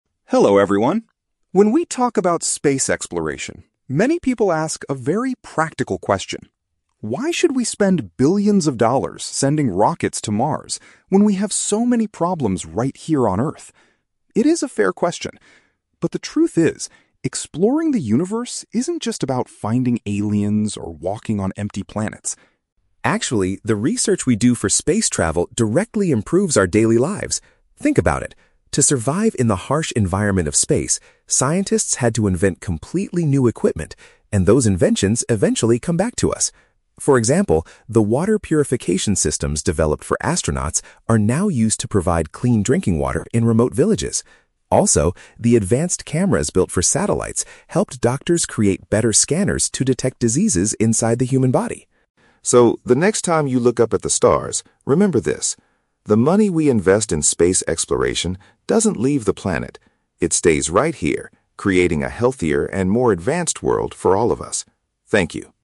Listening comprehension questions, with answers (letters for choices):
Listen to a short presentation about space exploration and choose the correct answer (A, B, or C) for each question.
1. Why do some people criticize spending money on space missions?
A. Because the rockets built to travel to Mars are extremely dangerous.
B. Because they believe we should focus on fixing local issues on our own planet.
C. Because they think scientists are only interested in finding alien life.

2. What space technology is now helping people in isolated areas?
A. Machines that make water safe for human consumption.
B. Special tools used to build stronger houses in remote villages.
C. Methods to grow fresh vegetables in very harsh environments.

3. How has space research specifically benefited the medical field?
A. It provided hospitals with new medicines to cure unusual diseases.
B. It allowed surgeons to perform operations remotely using satellites.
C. It led to the creation of improved imaging devices to look inside patients.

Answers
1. B
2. A
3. C

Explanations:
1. The speaker says people ask why we spend money on space "when we have so many problems right here on Earth." Option (B) perfectly paraphrases this idea ("fixing local issues on our own planet" = problems right here on Earth). Option (A) is a trap; "rockets to Mars" are mentioned, but not because they are dangerous. Option (C) is a trap; "finding aliens" is mentioned as something space exploration is not just about.
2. The speaker mentions that "water purification systems" (machines that make water safe) are now used in "remote villages" (isolated areas). Option (A) uses synonyms to express this. Option (B) is a trap; "remote villages" is mentioned, but the technology provides clean water, not stronger houses. Option (C) is a plausible benefit of space tech, but it is not mentioned in this speech.
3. The speaker explains that advanced cameras helped doctors create "better scanners to detect diseases inside the human body." Option (C) accurately paraphrases this ("improved imaging devices" = better scanners, "look inside patients" = inside the human body). Option (A) is a trap; "diseases" are mentioned, but the technology helps detect them, not cure them with medicine. Option (B) is a trap; "satellites" are mentioned as the origin of the camera technology, but they are not used for remote surgeries here.

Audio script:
Speaker: Hello everyone. When we talk about space exploration, many people ask a very practical question: "Why should we spend billions of dollars sending rockets to Mars when we have so many problems right here on Earth?" It is a fair question. But the truth is, exploring the universe isn't just about finding aliens or walking on empty planets.
Actually, the research we do for space travel directly improves our daily lives. Think about it. To survive in the harsh environment of space, scientists had to invent completely new equipment. And those inventions eventually come back to us. For example, the water purification systems developed for astronauts are now used to provide clean drinking water in remote villages. Also, the advanced cameras built for satellites helped doctors create better scanners to detect diseases inside the human body.
So, the next time you look up at the stars, remember this: the money we invest in space exploration doesn't leave the planet. It stays right here, creating a healthier and more advanced world for all of us. Thank you.